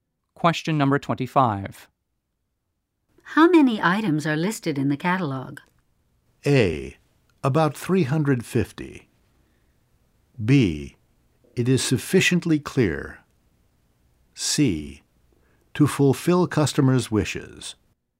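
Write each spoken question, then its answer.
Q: How many items are listed in the catalog?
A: A: About 350.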